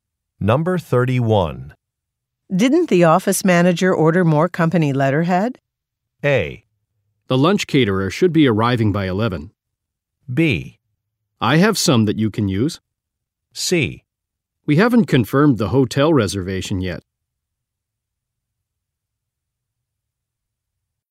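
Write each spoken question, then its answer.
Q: Didn't the office manager order more company letterhead?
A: B: I have some that you can use.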